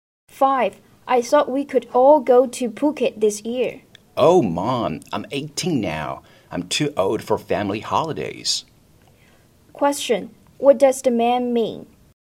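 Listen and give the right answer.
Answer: He doesn't want to go on a family holiday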